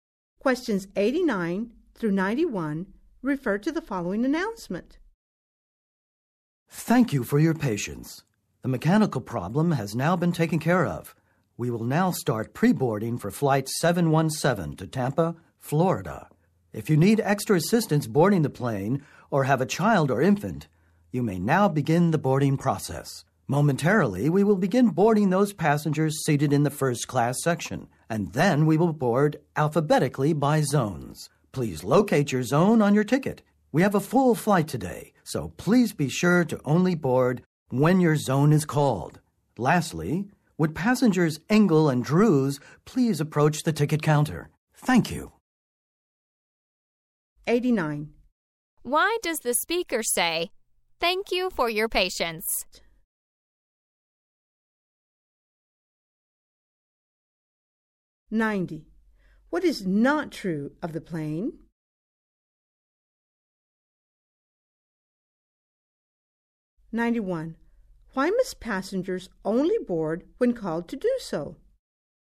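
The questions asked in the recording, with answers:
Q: Why does the speaker say, "Thank you for your patience"?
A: The flight was delayed by a mechanical problem

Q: Why must passengers only board when called to do so?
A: The flight is full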